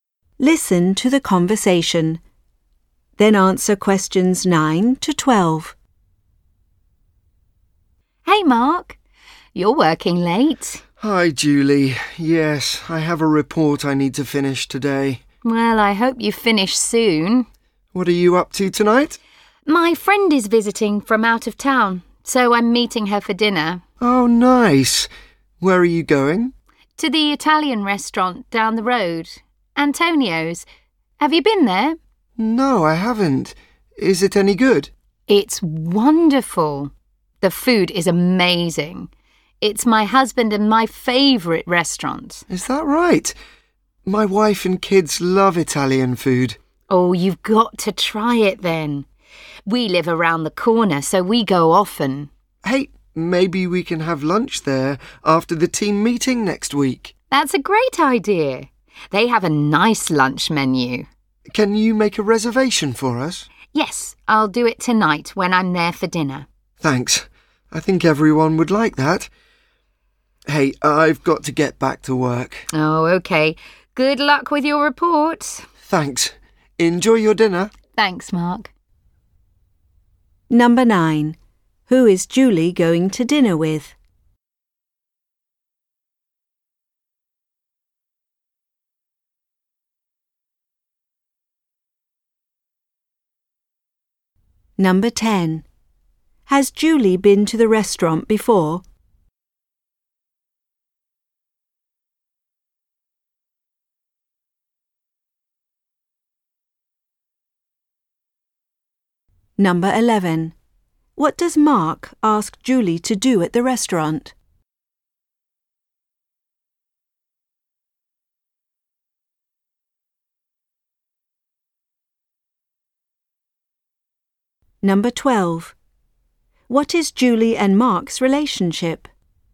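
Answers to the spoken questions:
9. A friend visiting from out of town
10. Yes, she goes often
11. Make a reservation for lunch
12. They are coworkers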